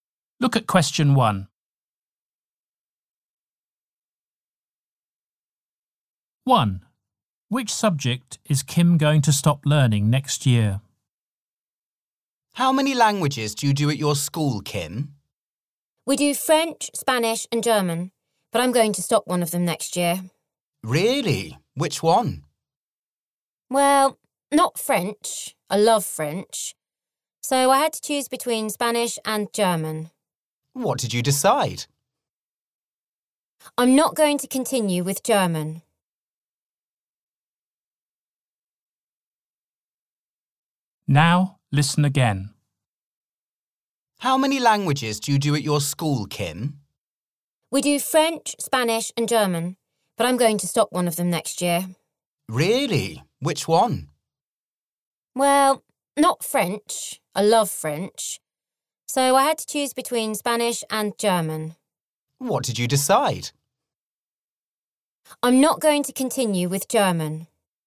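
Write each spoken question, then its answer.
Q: Which subject is Kim going to stop learning next year?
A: German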